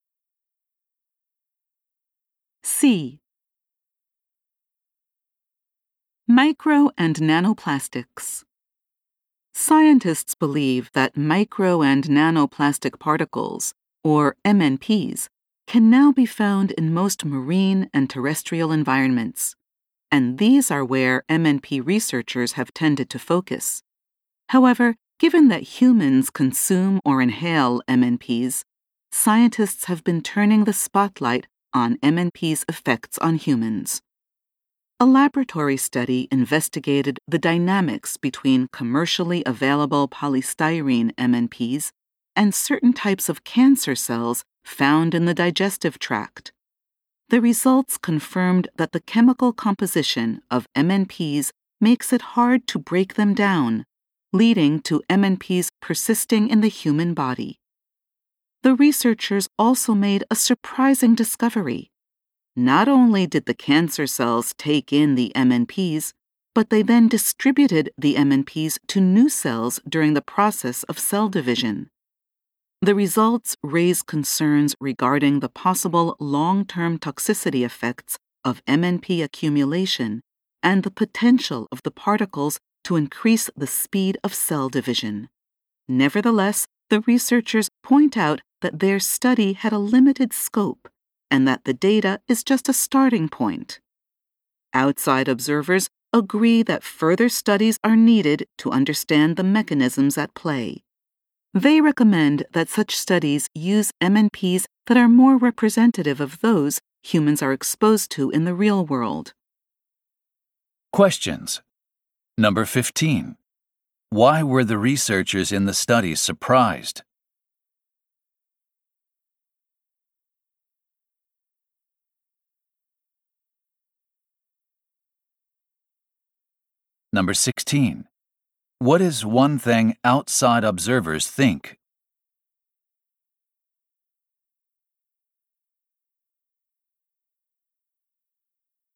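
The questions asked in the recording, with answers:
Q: Why were the researchers in the study surprised?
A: Cancer cells took in MNPs and passed them to new cells during cell division

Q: What is one thing outside observers think?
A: Further studies should use MNPs more representative of real-world exposure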